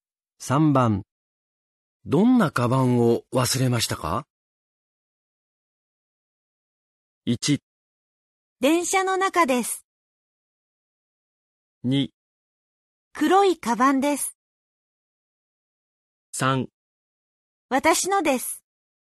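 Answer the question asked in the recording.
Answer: 2: 黒いカバンです。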